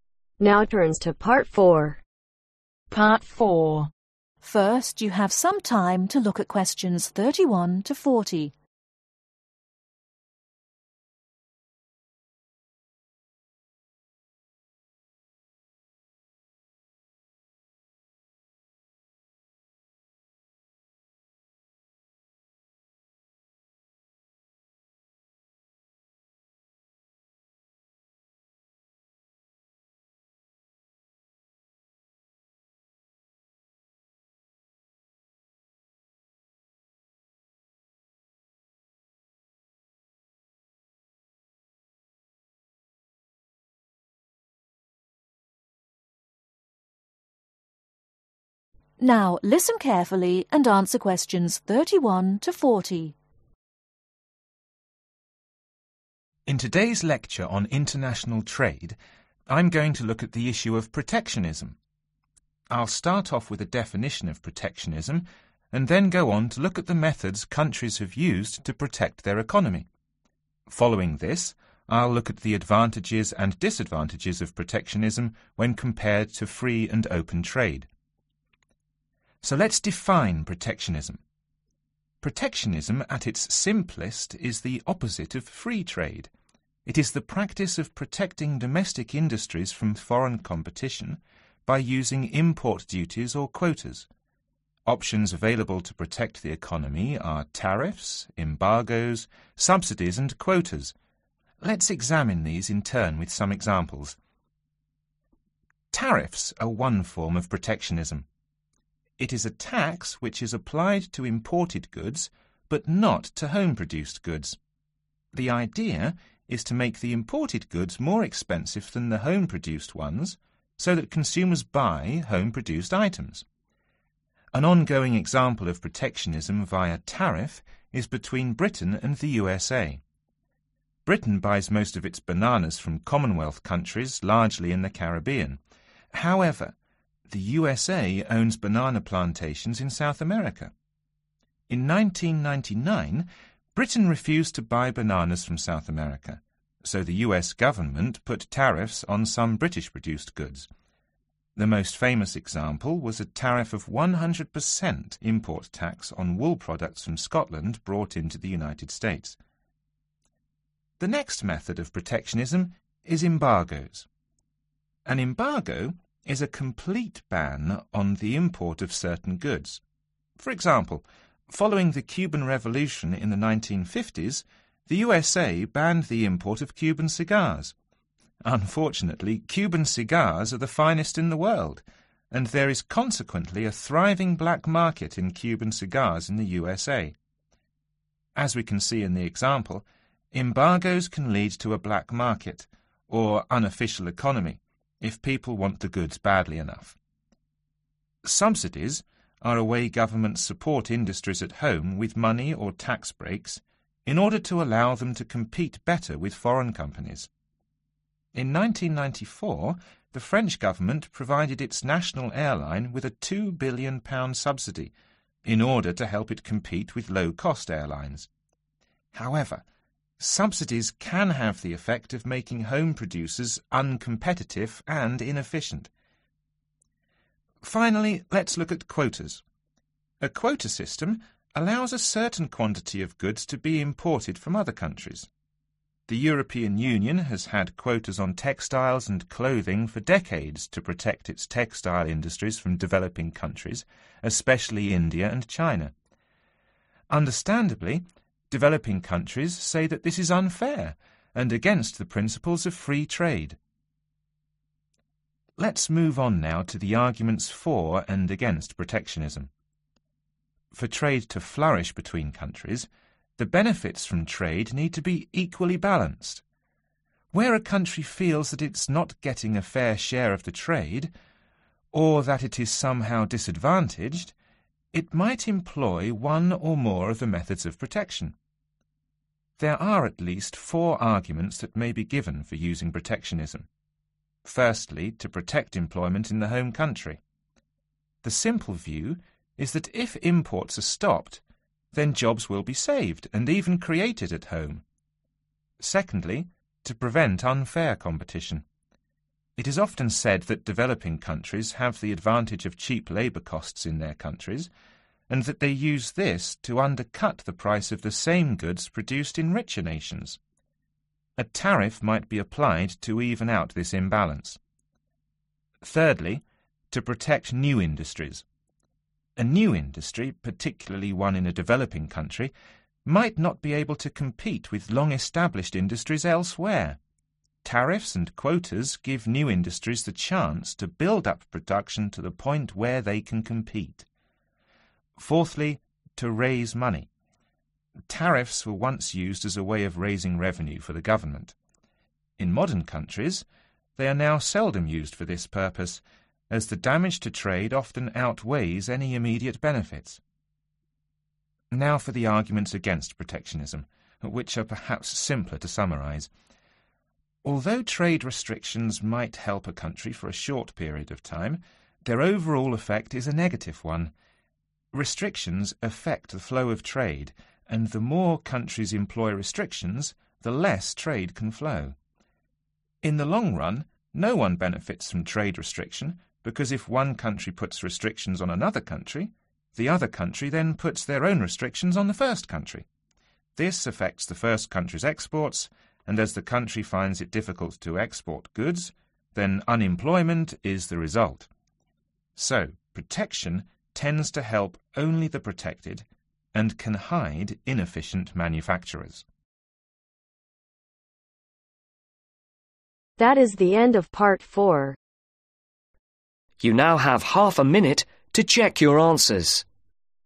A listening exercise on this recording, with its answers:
Complete the notes below. write ONE WORD ONLY for each answer.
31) Tariffs: a (31) ............ on imported goods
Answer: tax

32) making them more (32) ............ than home-produced goods.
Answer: expensive

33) Embargoes , that is a (33) ............ ban on the import of certain goods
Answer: complete

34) but these can result in an (34) ............ economy.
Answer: unofficial

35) Subsidies are when a government supports home industries with (35) ............ breaks to enable them to complete better.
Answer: money/tax

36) The quota system allows a certain (36) ............ to be imported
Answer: quantity

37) but developing countries think these are (37) ............ and against free trade.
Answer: unfair

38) -to protect (38)............ in the home country.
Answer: employment

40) Restrictions on goods affect the flow of (40) ............. so that no one benefits.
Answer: trade